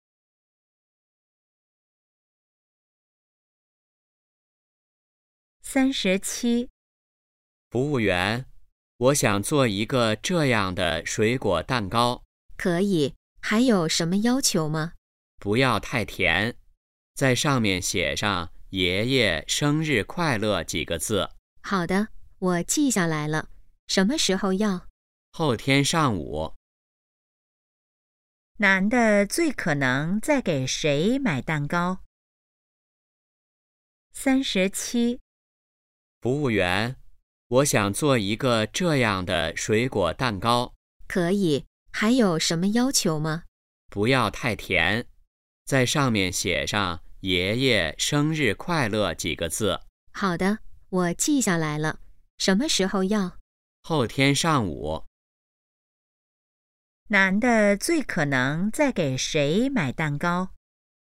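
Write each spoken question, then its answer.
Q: 男的最可能在给谁买蛋糕?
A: 爷爷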